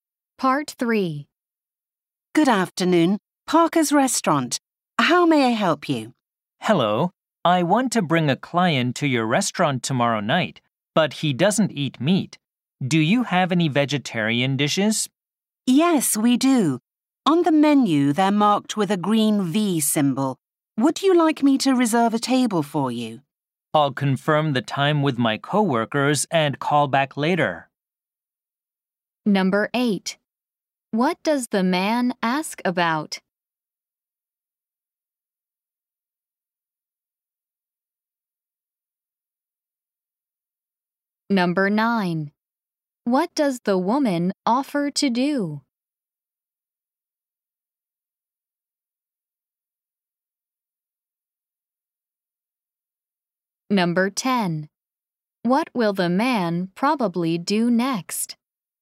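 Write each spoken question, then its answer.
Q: What does the man ask about?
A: Whether the restaurant has vegetarian dishes

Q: What does the woman offer to do?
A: Reserve a table

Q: What will the man probably do next?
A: Confirm the time with his coworkers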